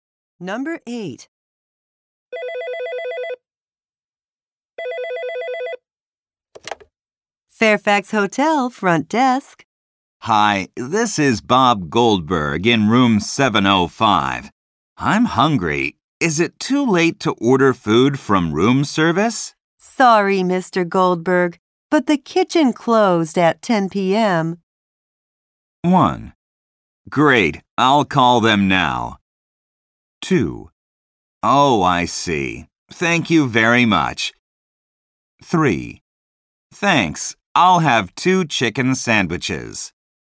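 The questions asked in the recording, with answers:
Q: Sorry, Mr. Goldberg, but the kitchen closed at 10 p.m.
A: 2: Oh, I see. Thank you very much.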